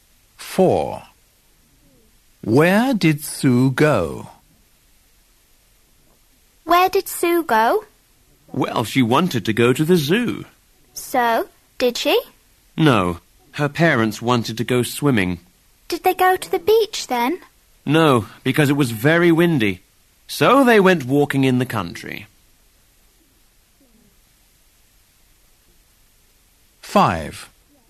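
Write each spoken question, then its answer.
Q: Where did Sue go?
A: walking in the country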